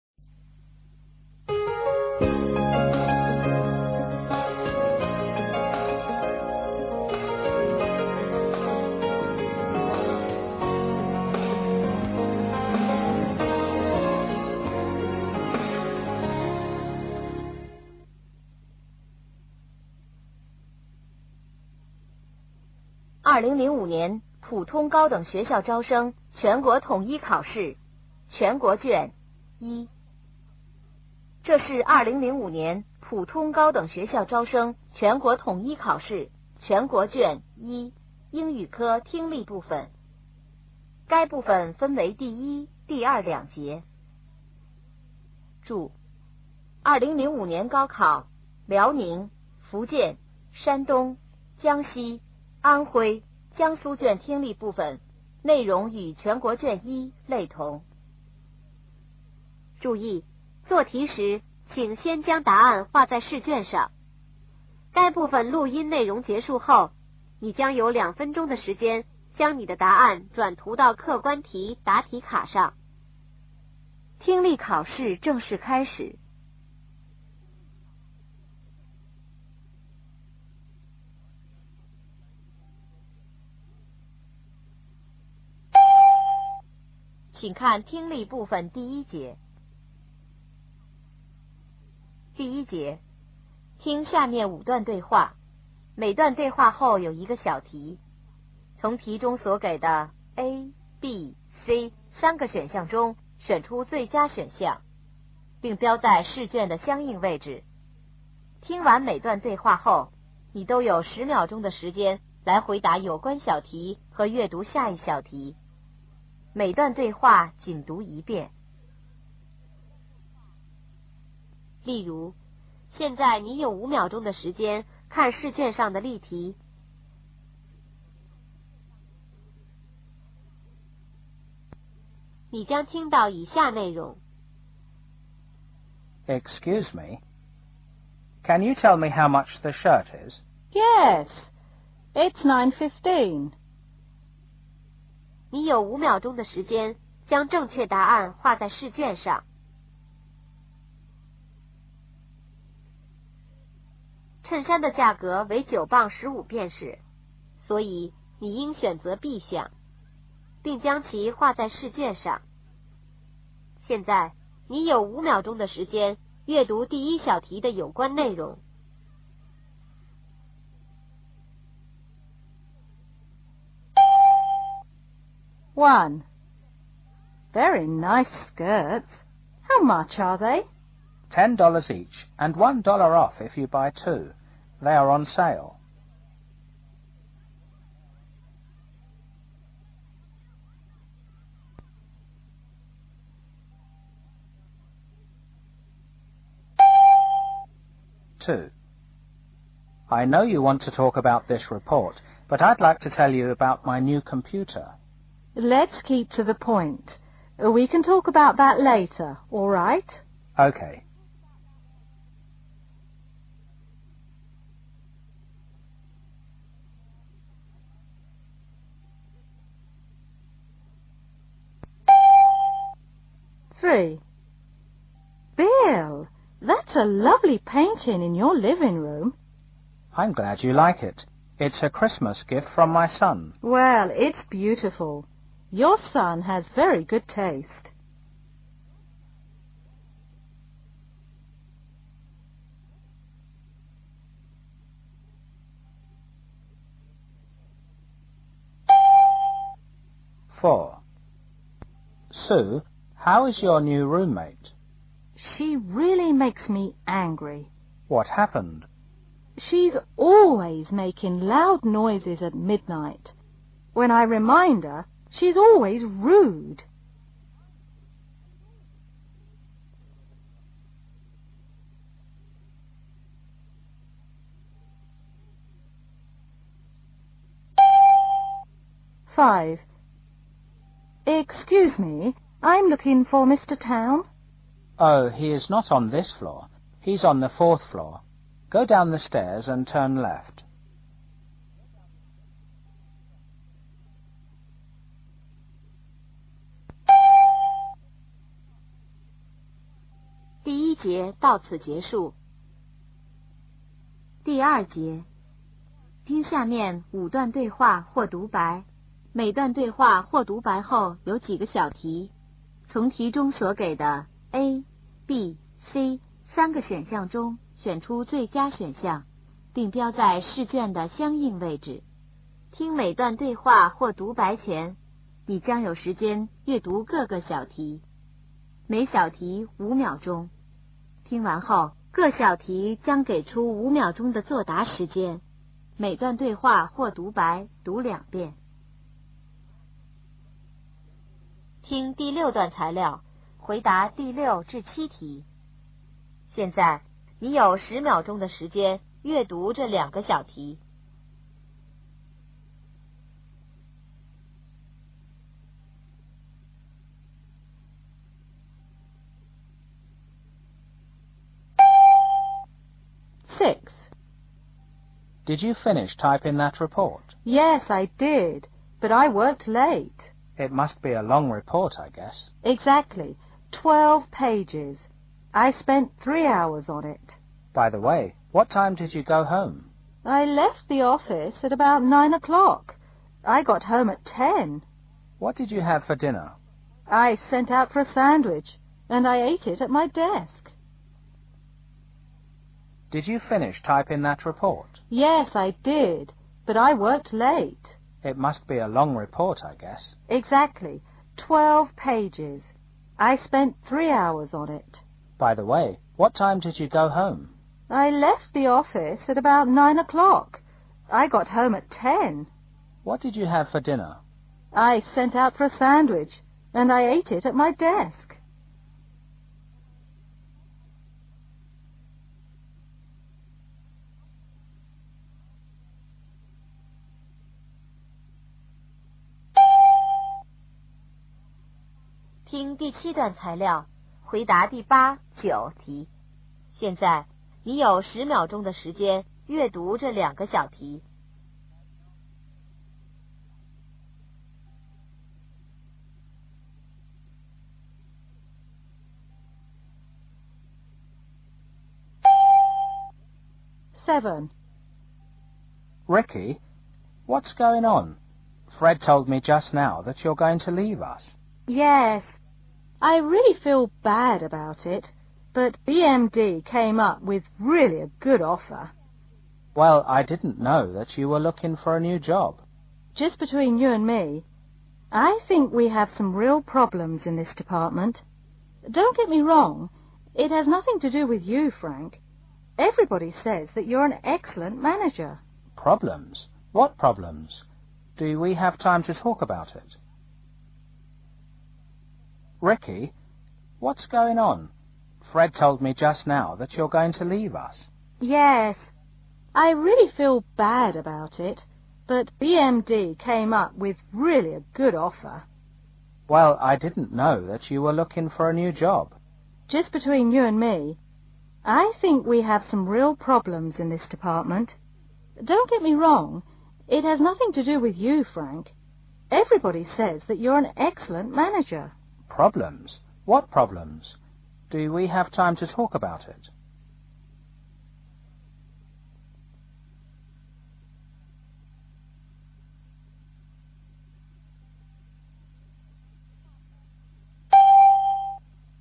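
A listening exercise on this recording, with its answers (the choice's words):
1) How much will the woman pay id she buys two skirts?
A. $18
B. $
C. $20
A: $

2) What will the speakers discuss?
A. A report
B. A computer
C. A report on computer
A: A report

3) What are the speakers talking about?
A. A child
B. A room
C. A present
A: A present

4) What can we learn from this conversation?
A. The woman does not get along well with the man.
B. The woman does not get along well with her roommate.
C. The man will talk with the woman's roommate.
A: The woman does not get along well with her roommate.

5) Where are the two speakers now?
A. On the first floor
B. On the fourth floor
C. On the fifth floor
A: On the fifth floor

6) What was the woman doing before she went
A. Typident-count: 2.0; mso-linng a report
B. Rewriting a report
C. Reviewing a report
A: Typident-count: 2.0; mso-linng a report

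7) Where did the woman have her dinner?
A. In a restaurant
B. In her office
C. At home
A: In her office

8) Why does the man feel surprised?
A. The woman has found a new job.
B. The woman doesn't feel like leaving.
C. The woman disagrees with him.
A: The woman has found a new job.

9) What does the woman say about her department?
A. There is a lack of trust.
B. There are serious problems.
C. There is too much pressure.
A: There are serious problems.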